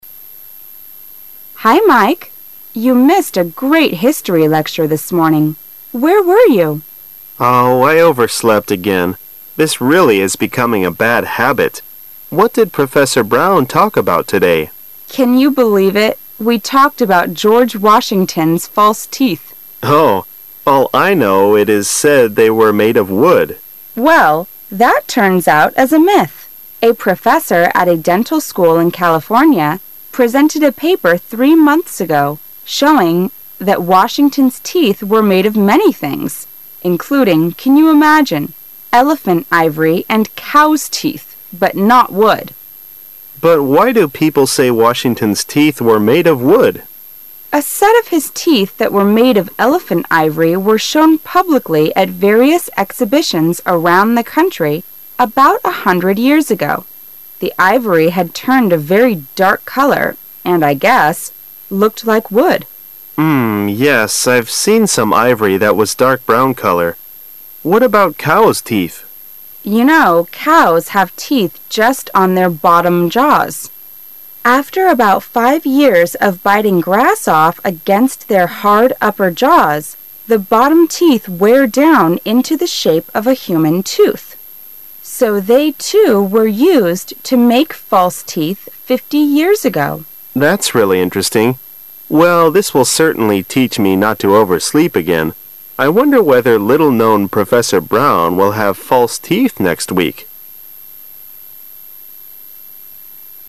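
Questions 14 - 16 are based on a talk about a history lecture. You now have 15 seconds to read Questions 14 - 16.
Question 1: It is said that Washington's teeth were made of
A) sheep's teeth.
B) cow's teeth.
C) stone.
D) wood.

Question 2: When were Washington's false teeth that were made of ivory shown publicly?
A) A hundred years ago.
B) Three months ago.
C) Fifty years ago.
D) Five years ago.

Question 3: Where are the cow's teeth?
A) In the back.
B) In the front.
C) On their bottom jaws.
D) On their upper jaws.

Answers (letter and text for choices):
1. D) wood.
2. A) A hundred years ago.
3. C) On their bottom jaws.

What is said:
[解析] 14-16 W: Hi, Mike! You missed a great history lecture this morning. Where were you? M: Oh, I overslept again. This really is becoming a bad habit. What did Professor Brown talk about today? W: Can you believe it? We talked about George Washington's false teeth. 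M: Oh, all I know it is said they were made of wood. W: Well, that turns out as a myth. A professor at a dental school in California presented a paper three months ago showing that Washington's teeth were made of many things, including, can you imagine, elephant ivory and cow's teeth, but not wood. M: But why do people say Washington's teeth were made of wood? W: A set of his teeth that were made of elephant ivory were shown publicly at various exhibitions around the country about a hundred years ago. The ivory had turned a very dark color, and I guess, look like wood. I've seen some ivory that was dark brown color. What about cow's teeth? W: You know cows have teeth just on their bottom jaws. After about five years of biting grass off against their hard upper jaws, the bottom teeth wear down into the shape of a human tooth. So they, too ,were used to make false teeth fifty years ago. M: That's really interesting. 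Well, this will certainly teach me not to oversleep again. I wonder whether little-known Professor Brown will have false teeth next week.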